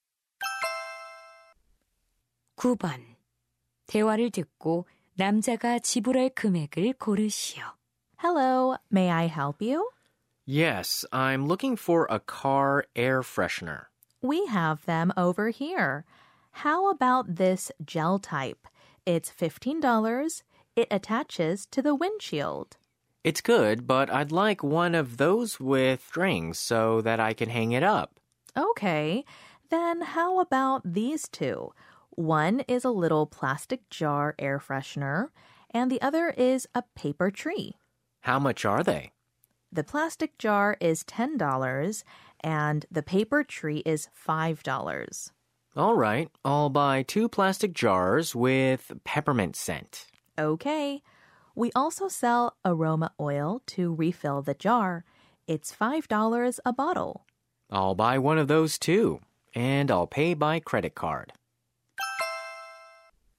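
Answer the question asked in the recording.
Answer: $25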